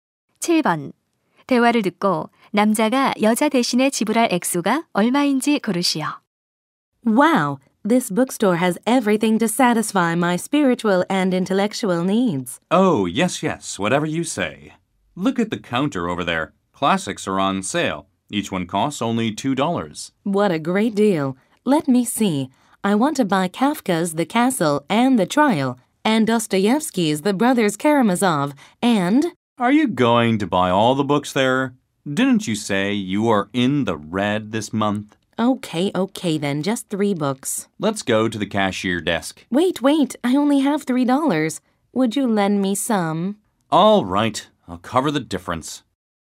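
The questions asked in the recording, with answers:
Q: 대화를 듣고 남자가 여자 대신에 지불할 액수가 얼마인지 고르시오.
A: 3달러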